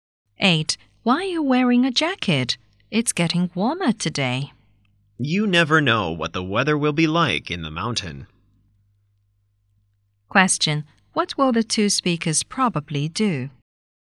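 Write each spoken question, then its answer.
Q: What will the two speakers probably do?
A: Go to the mountains.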